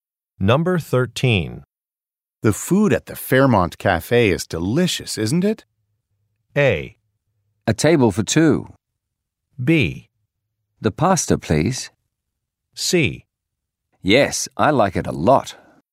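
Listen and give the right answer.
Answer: C: Yes, I like it a lot.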